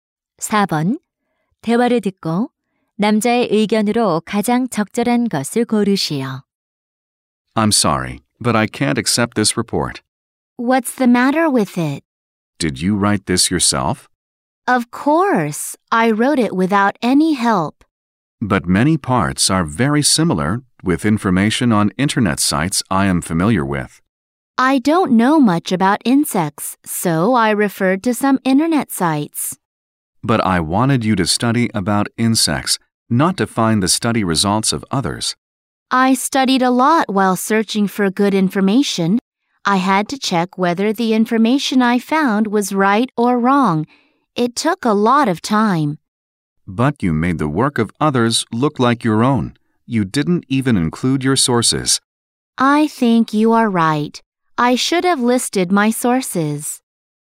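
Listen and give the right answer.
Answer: 다른 사람의 자료를 자기 것처럼 베끼면 안 되고 출처를 밝혀야 한다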